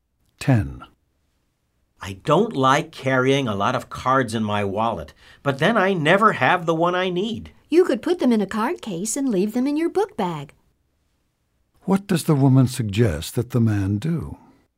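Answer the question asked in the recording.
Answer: Put his cards in a card case in his book bag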